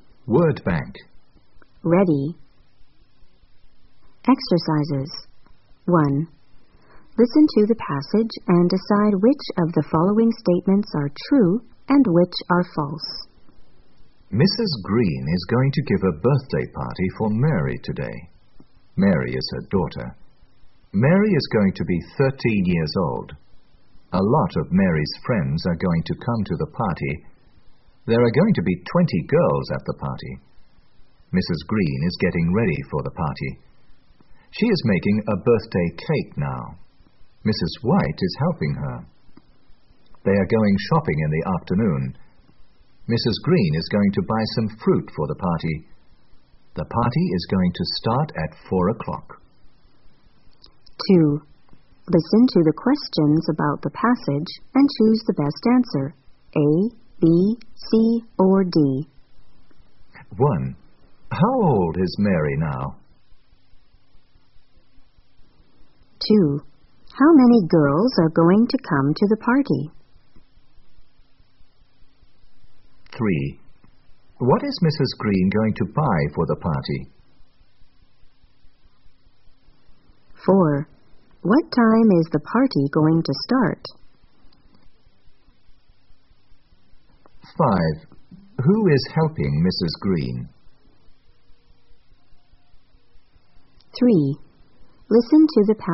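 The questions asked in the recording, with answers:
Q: How many girls are going to come to the party?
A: 20

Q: What is Mrs. Green going to buy for the party?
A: some fruit

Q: What time is the party going to start?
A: at 4 o'clock

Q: Who is helping Mrs. Green?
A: Mrs. White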